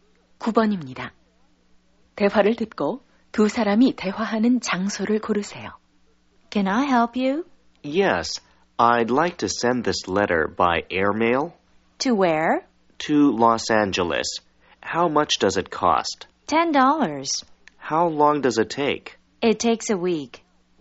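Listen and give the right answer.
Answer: 우체국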